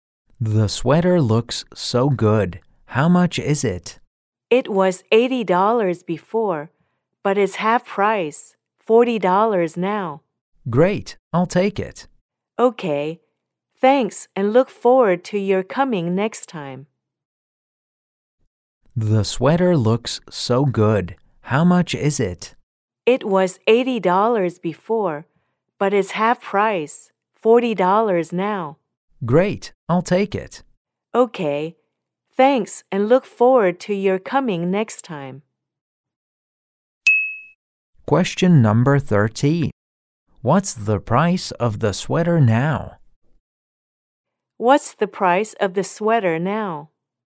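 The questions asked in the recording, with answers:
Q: What's the price of the sweater now?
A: $40.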